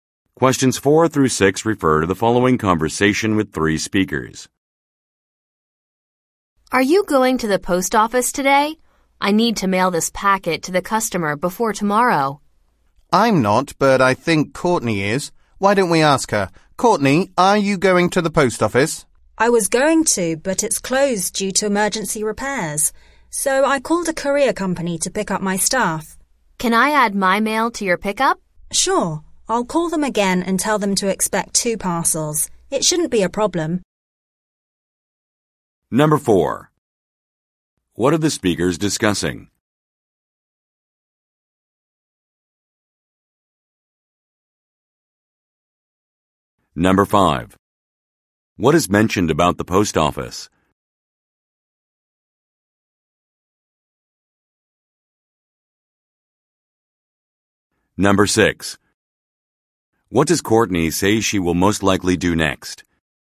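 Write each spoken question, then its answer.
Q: What are the speakers discussing?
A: Mailing a packet to a customer

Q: What is mentioned about the post office?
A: It is closed for emergency repairs

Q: What does Courtney say she will most likely do next?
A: Call the courier company again to say there are 2 parcels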